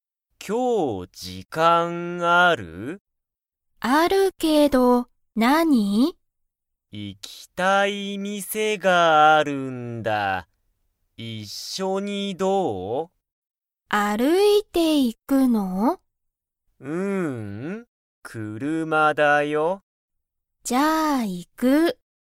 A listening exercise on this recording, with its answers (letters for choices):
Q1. マサトとミユキは、その店(みせ)に歩(ある)いていきますか?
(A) はい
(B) いいえ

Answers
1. B

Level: Level 1